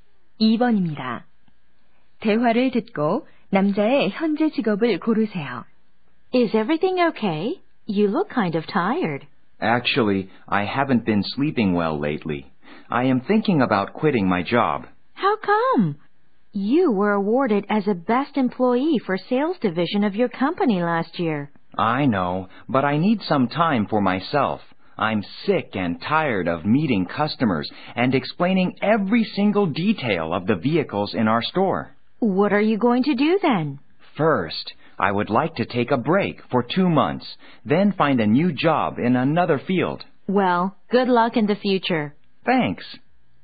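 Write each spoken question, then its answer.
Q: 대화를 듣고 남자의 현재 직업을 고르세요.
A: 자동차 판매원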